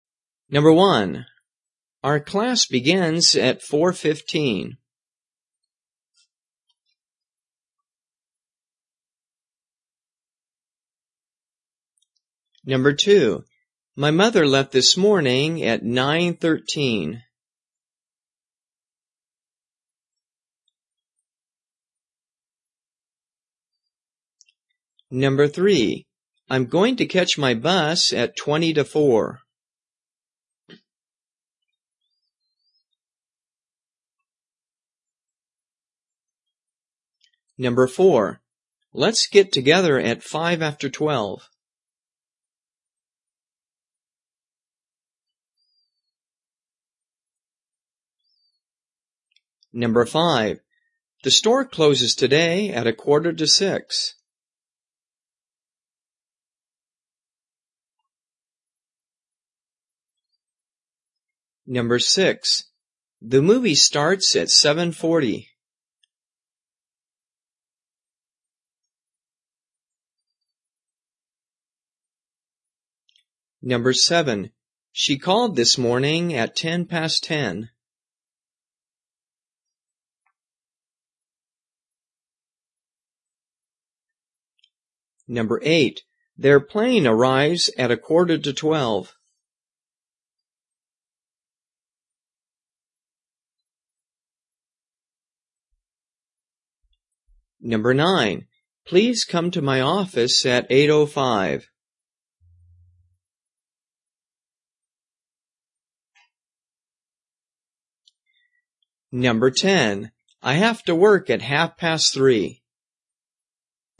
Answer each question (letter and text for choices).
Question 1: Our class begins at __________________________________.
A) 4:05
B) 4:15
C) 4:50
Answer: B) 4:15

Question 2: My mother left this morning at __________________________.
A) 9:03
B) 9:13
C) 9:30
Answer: B) 9:13

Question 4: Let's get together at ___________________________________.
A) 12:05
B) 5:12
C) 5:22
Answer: A) 12:05

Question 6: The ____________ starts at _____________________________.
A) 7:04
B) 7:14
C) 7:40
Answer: C) 7:40

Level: 初级